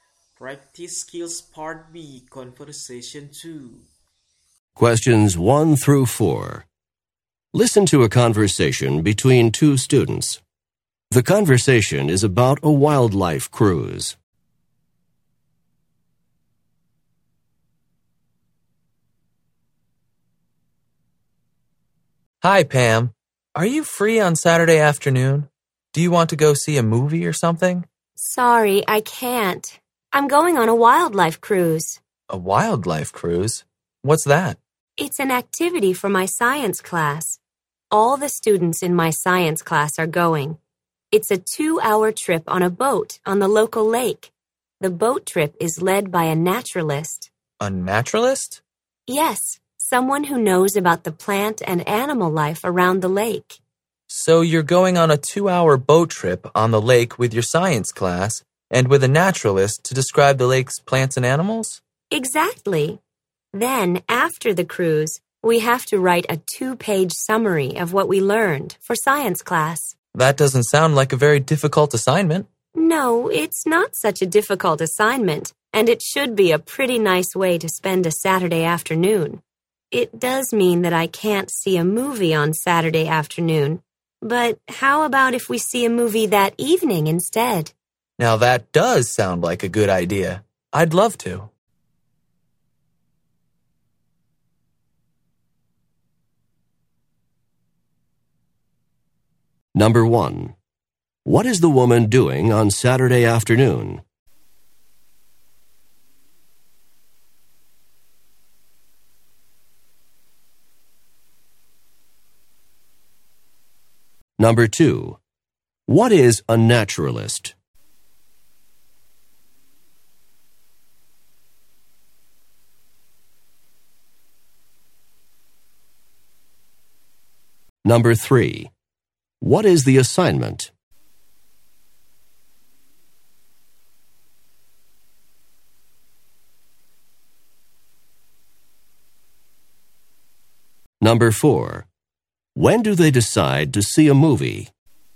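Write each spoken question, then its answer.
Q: What is the woman doing on Saturday afternoon?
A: Going on a wildlife cruise

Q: What is a naturalist?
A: Someone who knows about plant and animal life

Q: What is the assignment?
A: Write a 2-page summary of what they learned on the cruise

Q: When do they decide to see a movie?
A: Saturday evening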